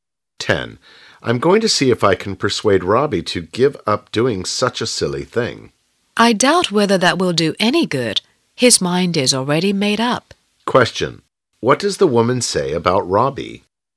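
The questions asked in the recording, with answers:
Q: What does the woman say about Robbie?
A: He has already made up his mind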